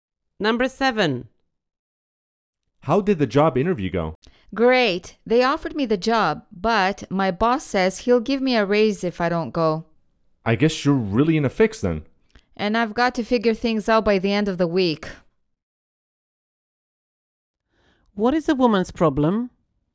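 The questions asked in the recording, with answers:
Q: What is a woman's problem?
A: She must decide between the new job and a raise at her current job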